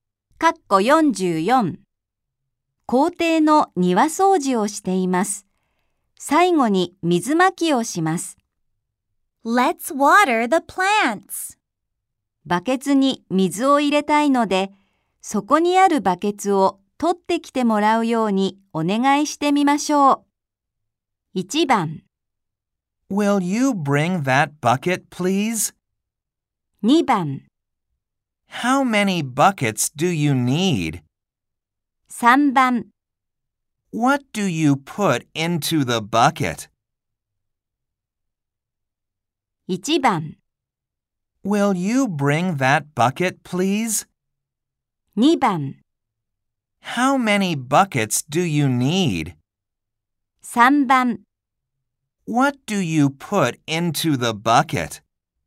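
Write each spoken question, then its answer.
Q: バケツに水を入れたいので、そこにあるバケツを取ってきてもらうようにお願いしてみましょう。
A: 1: Will you bring that bucket, please?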